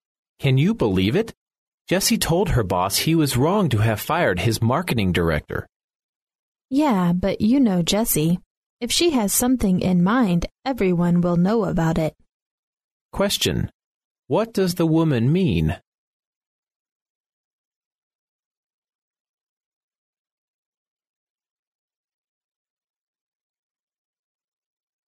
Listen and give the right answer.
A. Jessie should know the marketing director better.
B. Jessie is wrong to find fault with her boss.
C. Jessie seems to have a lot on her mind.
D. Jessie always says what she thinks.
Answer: D. Jessie always says what she thinks.